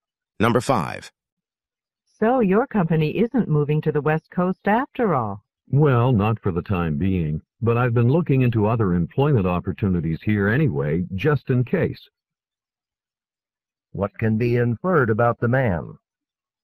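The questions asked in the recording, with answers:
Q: What can be inferred about the man?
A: He is looking for another job nearby in case his company moves later.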